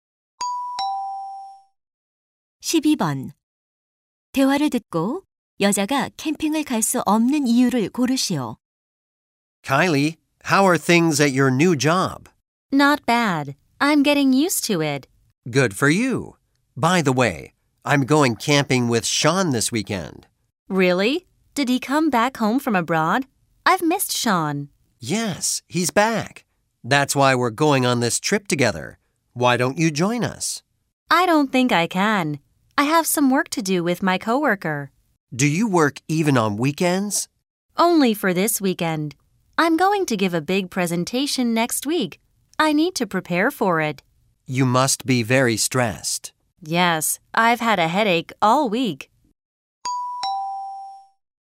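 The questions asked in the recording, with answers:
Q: 대화를 듣고 여자가 캠핑을 갈 수 없는 이유를 고르시오.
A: 다음 주 발표 준비를 해야 해서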